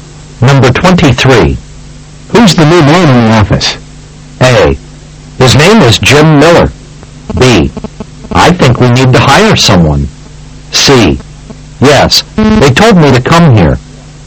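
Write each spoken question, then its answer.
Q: Who's the new man in the office?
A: A: His name is Jim Miller.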